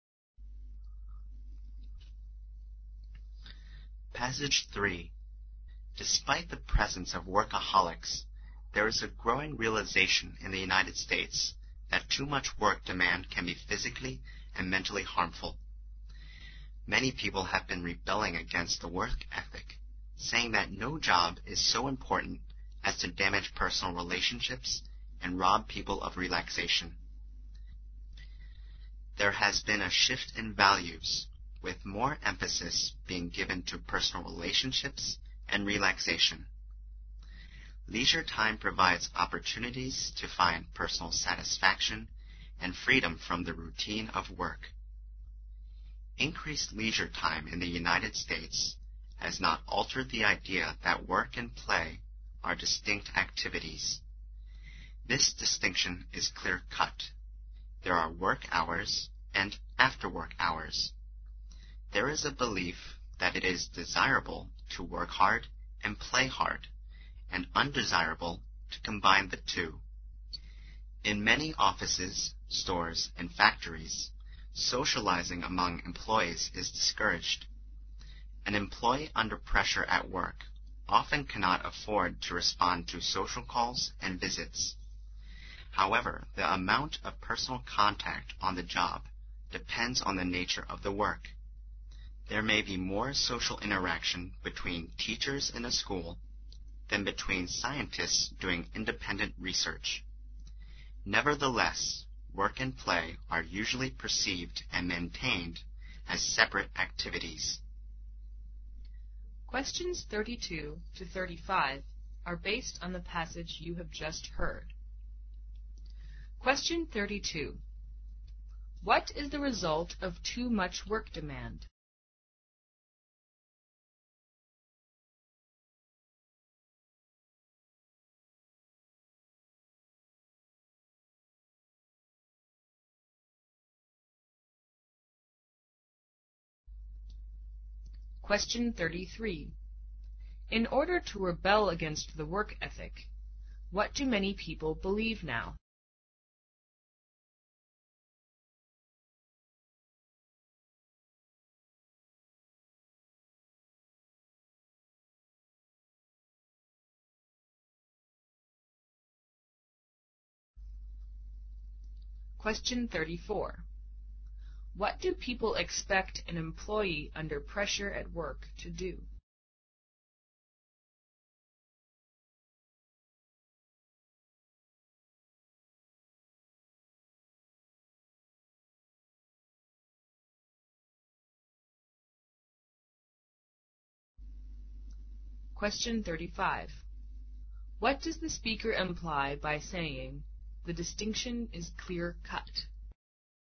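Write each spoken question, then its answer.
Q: What is the result of too much work demand?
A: It can be physically and mentally harmful

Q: In order to rebel against the work ethic, what do many people believe now?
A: No job is so important as to damage personal relationships and rob people of relaxation

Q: What do people expect an employee under pressure at work to do?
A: Not to respond to social calls and visits

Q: What does the speaker imply by saying, "The distinction is clear-cut"?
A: Work and play are kept strictly separate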